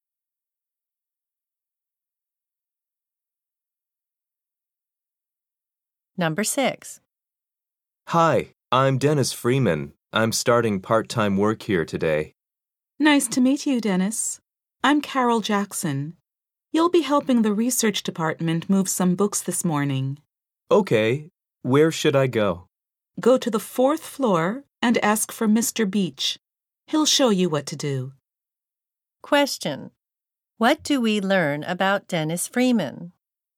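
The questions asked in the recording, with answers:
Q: What do we learn about Dennis Freeman?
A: He is starting part-time work there today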